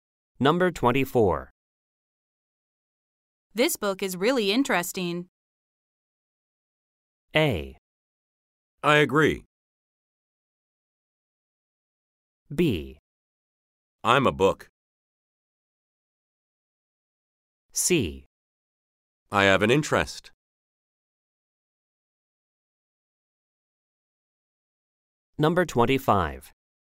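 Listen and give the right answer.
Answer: A: I agree.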